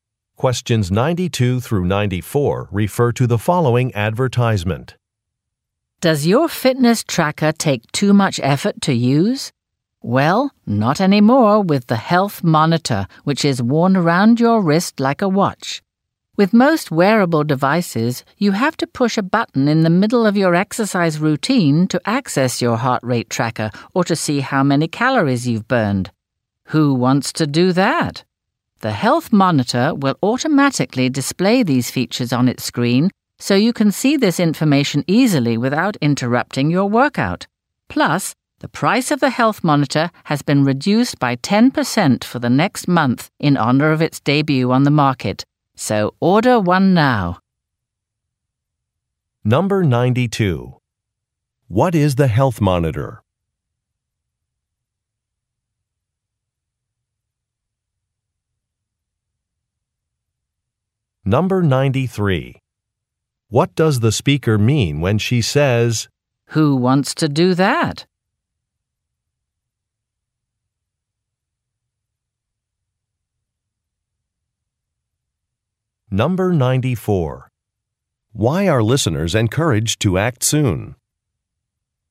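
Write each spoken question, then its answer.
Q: What is the Health Monitor?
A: A wearable fitness tracker

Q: What does the speaker mean when she says, "Who wants to do that?"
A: Pushing buttons during exercise is inconvenient

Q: Why are listeners encouraged to act soon?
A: The price is reduced by 10% for a limited time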